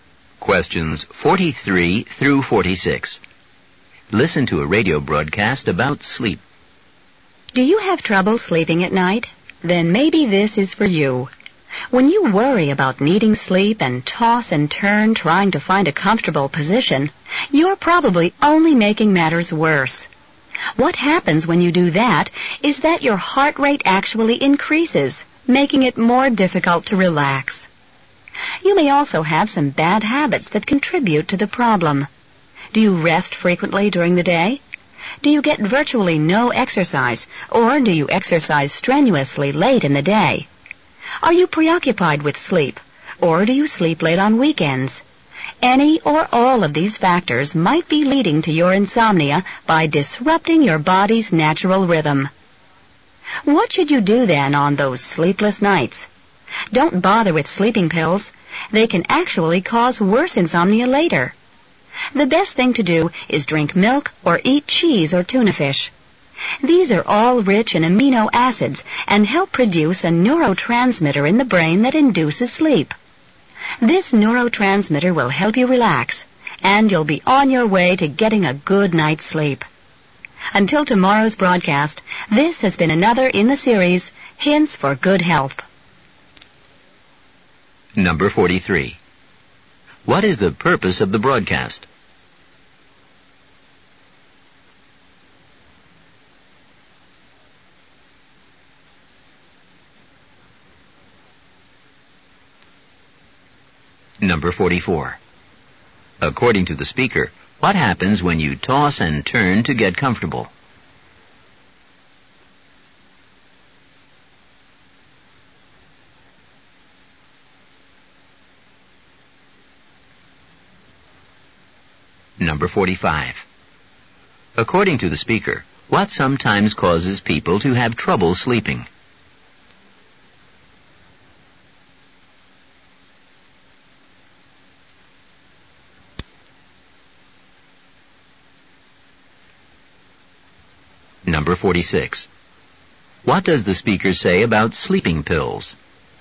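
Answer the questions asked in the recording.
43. To give advice on how to sleep better
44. Your heart rate increases, making it harder to relax
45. Bad habits that disrupt the body's natural rhythm
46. They can cause worse insomnia later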